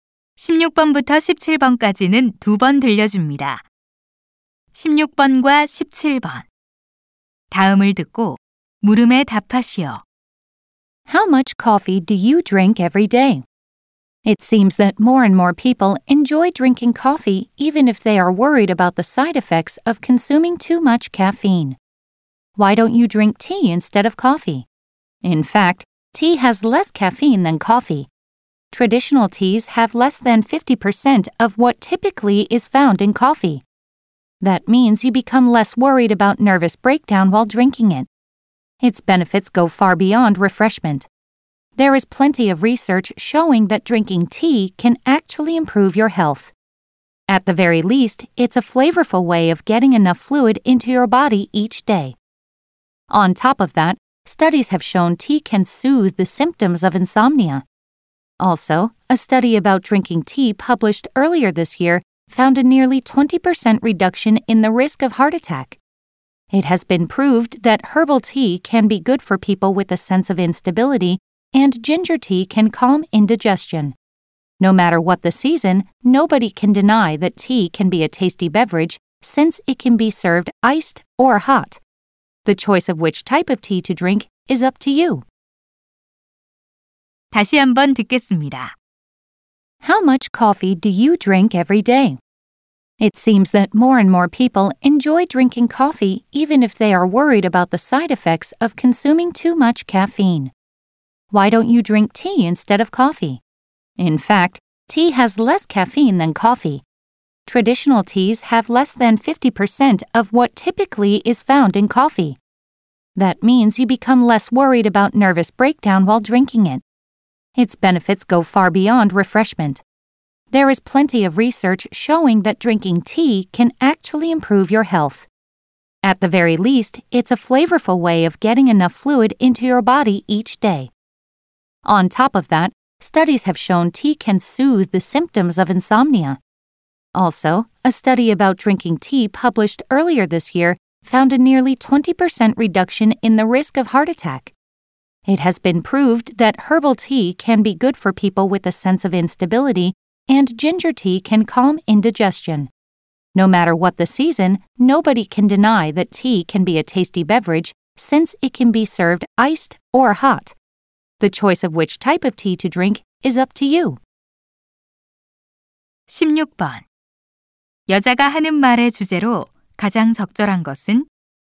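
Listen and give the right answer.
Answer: 커피 대신 차를 마시는 것의 이점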